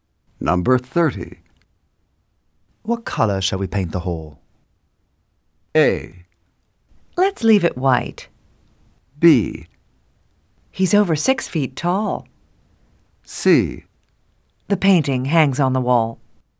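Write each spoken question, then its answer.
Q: What color shall we paint the hall?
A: A: Let's leave it white.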